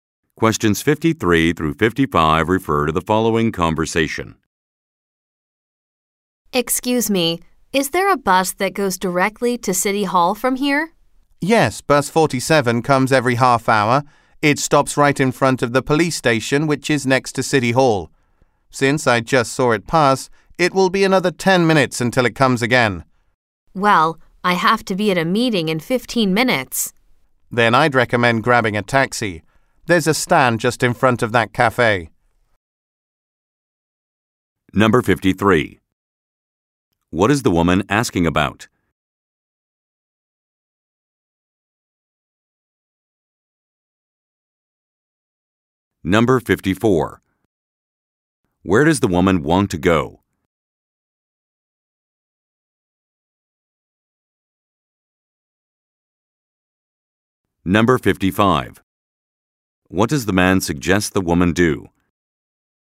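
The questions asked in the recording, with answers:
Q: What is the woman asking about?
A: A bus that goes directly to City Hall

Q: Where does the woman want to go?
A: City Hall

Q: What does the man suggest the woman do?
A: Take a taxi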